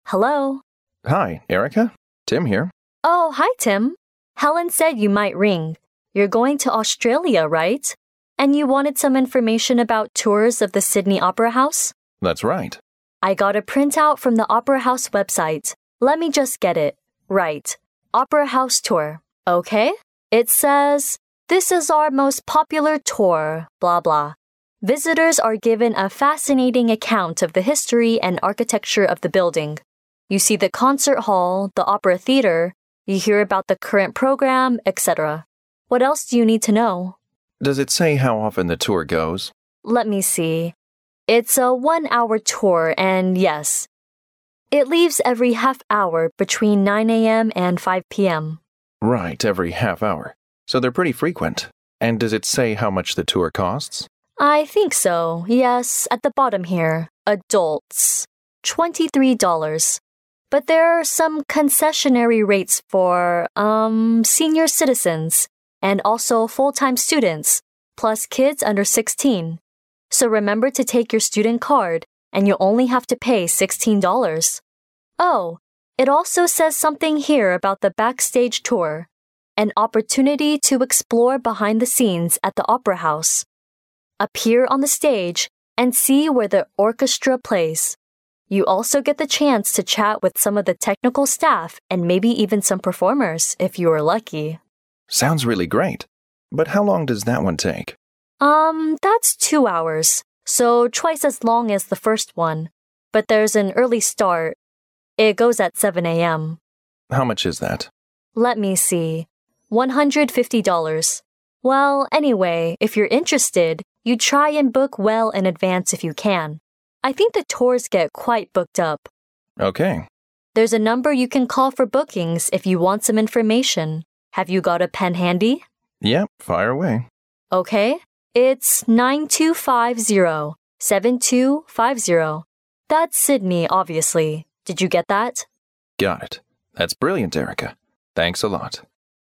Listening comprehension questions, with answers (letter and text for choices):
Directions:Each conversation will be read only once. At the end of each conversation, there will be a one-minute pause. During the pause, read the four choices marked A, B, C and D, and decide which is the best answer or complete the following sentences with one word according to what you hear.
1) Where is the woman getting information about the Opera House tour?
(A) From a brochure.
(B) From a travel agency.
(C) From a TV advertisement.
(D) From a website.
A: (D) From a website.

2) How long is the most popular tour in the Opera House?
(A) 2 hours.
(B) 0.5 hour.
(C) 1 hour.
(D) 8 hours.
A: (C) 1 hour.

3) The Opera House would give discounts to all the following people except ______.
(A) senior citizens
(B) disabled people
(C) full-time students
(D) children under 16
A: (B) disabled people

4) What will the man experience if he books the backstage tour?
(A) He can appear on the stage and see where the orchestra plays.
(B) He can chat with some famous actors and actresses.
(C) He will watch a fascinating opera performance.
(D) He will see what is going on behind the scene.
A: (A) He can appear on the stage and see where the orchestra plays.

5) For more information or tour booking, the man should call ______.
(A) 92507205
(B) 92257250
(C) 92527205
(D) 92507250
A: (D) 92507250

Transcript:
W: Hello.
M: Hi, Erica? Tim here.
W: Oh, hi, Tim. Helen said you might ring. You're going to Australia, right? And you wanted some information about tours of the Sydney Opera House?
M: That's right.
W: I got a printout from the Opera House website. Let me just get it...right. Opera House Tour. It says: "This is our most popular tour..." blah blah. "Visitors are given a fascinating account of the history and architecture of the building." You see the concert hall, the opera theatre, you hear about the current programme, et cetera. What else do you need to know?
M: Does it say how often the tour goes?
W: Let me see...it's a one-hour tour and, yes, "it leaves every half hour between 9 a.m. and to 5 p.m."
M: Right, every half hour. So they're pretty frequent. And does it say how much the tour costs?
W: I think so, yes, at the bottom here—adults...23 dollars. But there're some concessionary rates for, um, senior citizens, and also full-time students, plus kids under 16. So remember to take your student card and you'll only have to pay 16 dollars. Oh, it also says something here about the backstage tour, "An opportunity to explore behind the scenes at the Opera House. Appear on the stage and see where the orchestra plays." You also get the chance to chat with some of the technical staff and maybe even some performers, if you are lucky...
M: Sounds really great, but how long does that one take?
W: Um, that's two hours, so twice as long as the first one. But there's an early start—it goes at 7 a.m.
M: How much is that?
Well, anyway, if you're interested, you'd try and book well in advance if you can. I think the tours get quite booked up.
W: There's a number you can call for bookings or if you want some information. Have you get a pen handy?
M: Yeah. Fire away.
W: OK. It's 92507250. That's Sydney, obviously. Did you get that?
M: Got it. That's brilliant. Erica. Thanks a lot.